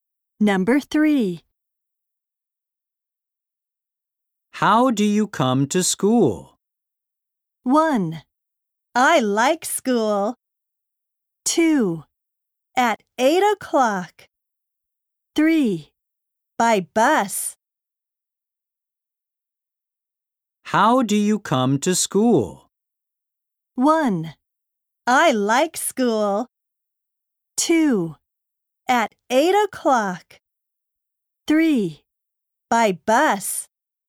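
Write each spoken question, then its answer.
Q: How do you come to school?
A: 3: By bus.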